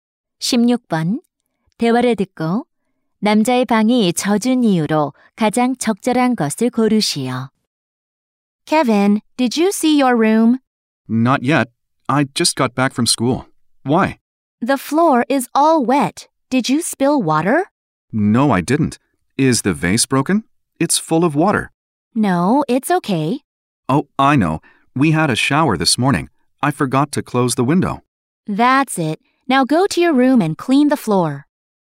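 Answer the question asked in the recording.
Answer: 창문을 닫지 않아 소나기가 들어와서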